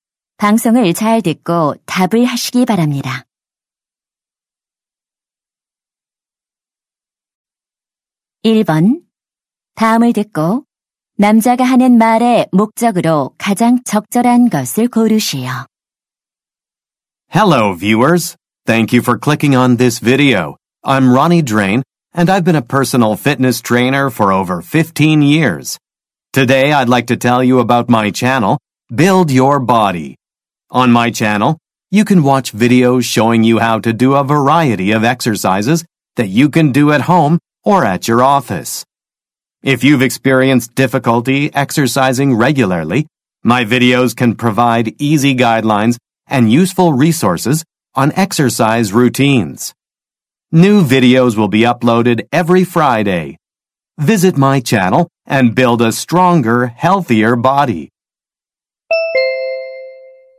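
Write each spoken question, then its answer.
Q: 다음을 듣고 남자가 하는 말의 목적으로 가장 적절한 것을 고르시오.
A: 자신의 운동 영상 채널을 홍보하려고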